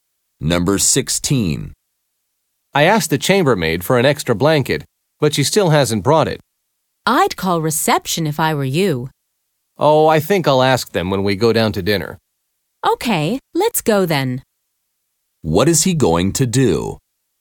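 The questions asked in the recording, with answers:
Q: What is he going to do?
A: Go down to dinner and ask reception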